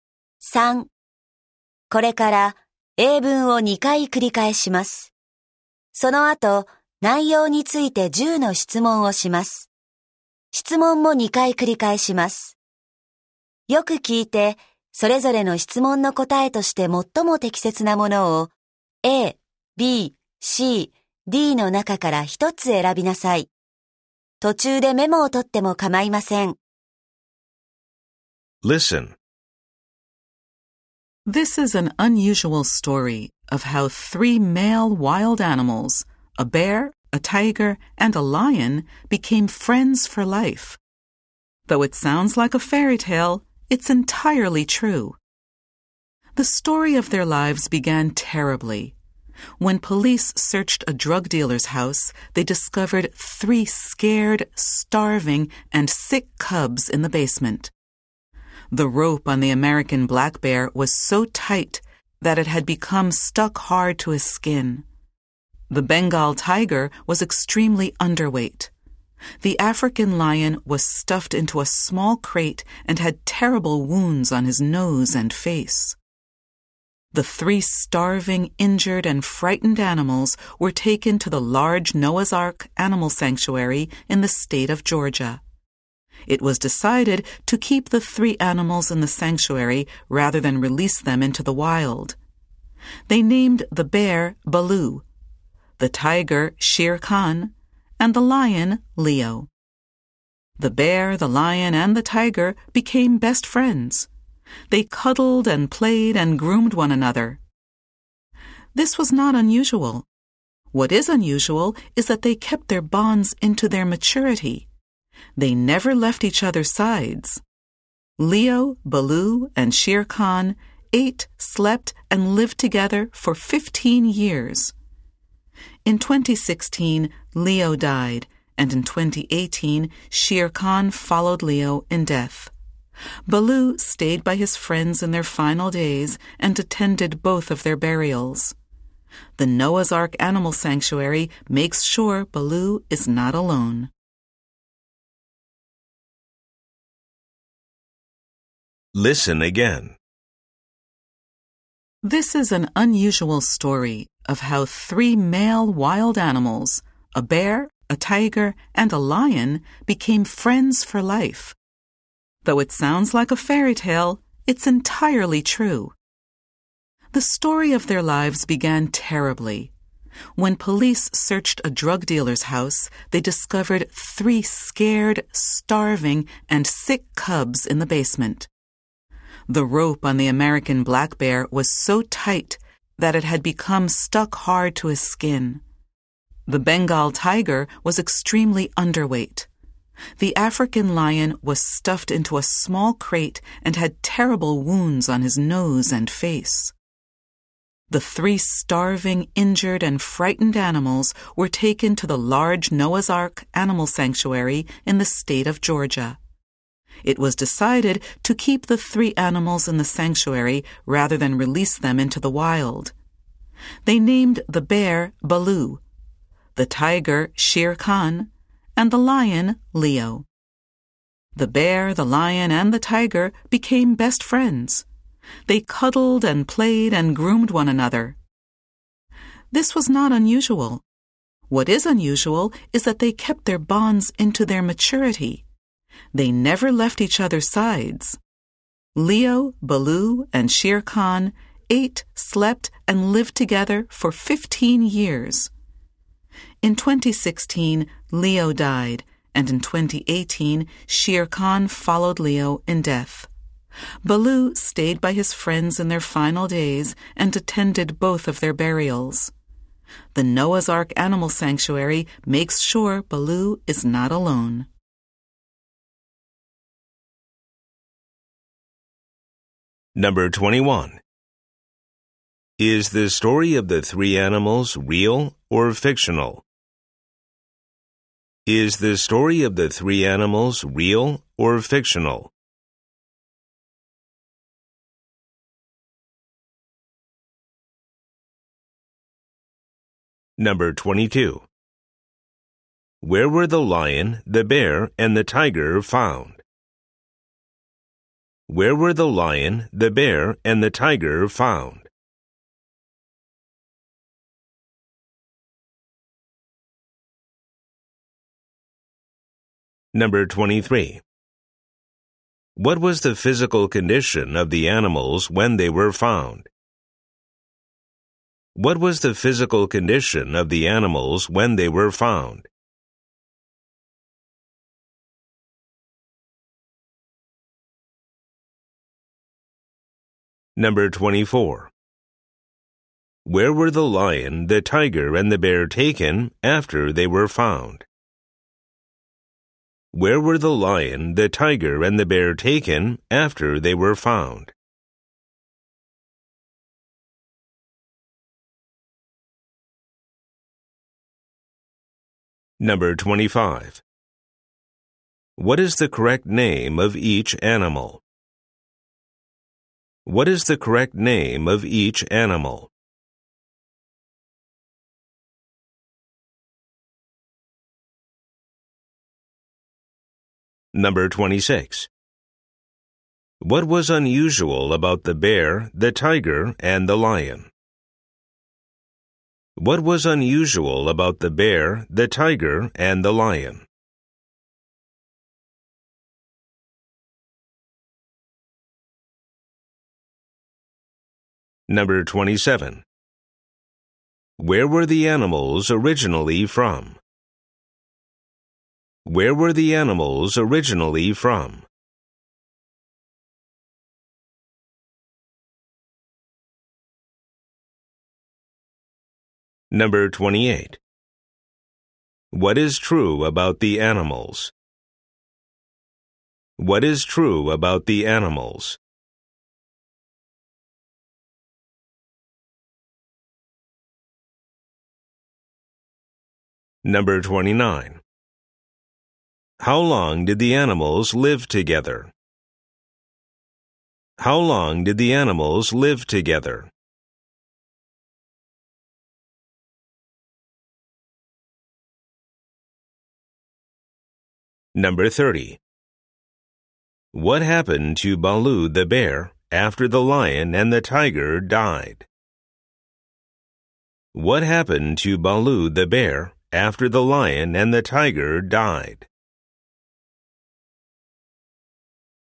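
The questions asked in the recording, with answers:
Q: Is the story of the three animals real or fictional?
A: Real; it's entirely true

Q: Where were the lion, the bear, and the tiger found?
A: In the basement of a drug dealer's house

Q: What was the physical condition of the animals when they were found?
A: Scared, starving, sick and injured

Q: Where were the lion, the tiger, and the bear taken after they were found?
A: To the Noah's Ark Animal Sanctuary in Georgia

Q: What is the correct name of each animal?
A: Bear: Baloo, tiger: Shere Khan, lion: Leo

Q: What was unusual about the bear, the tiger, and the lion?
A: They kept their friendship into adulthood and never left each other's sides

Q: How long did the animals live together?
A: 15 years

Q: What happened to Baloo the bear after the lion and the tiger died?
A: The sanctuary makes sure he is not alone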